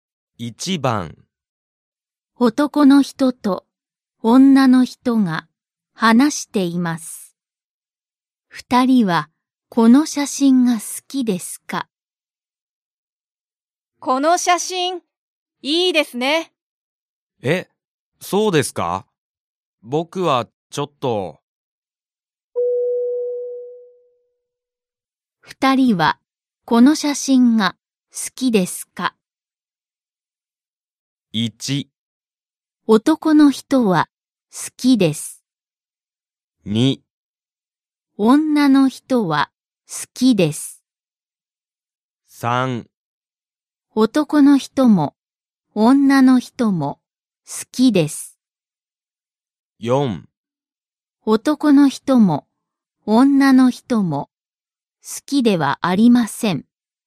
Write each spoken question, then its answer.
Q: 二人はこの写真が好きですか?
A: So you need to mark 正しい for choice two.